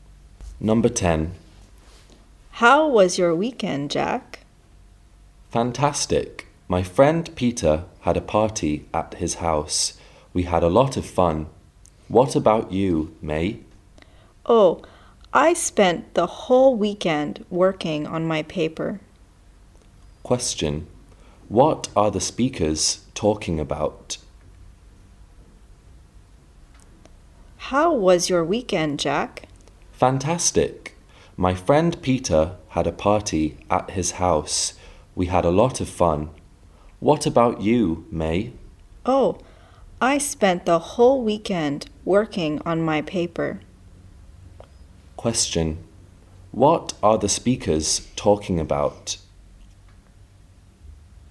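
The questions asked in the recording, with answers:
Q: What are the speakers talking about?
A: What they did at the weekend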